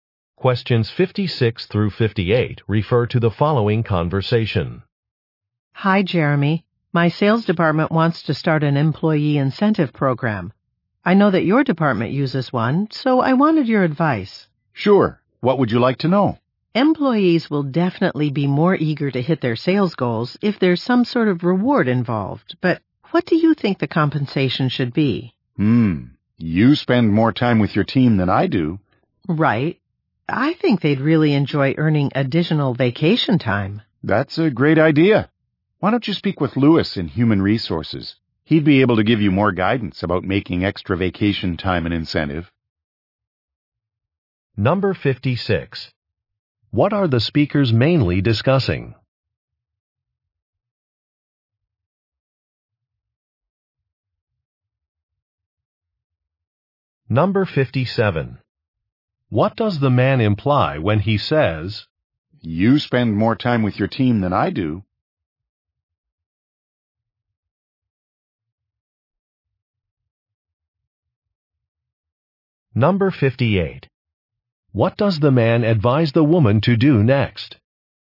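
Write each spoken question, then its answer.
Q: What are the speakers mainly discussing?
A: An employee incentive program

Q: What does the man advise the woman to do next?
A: Speak with Lewis in Human Resources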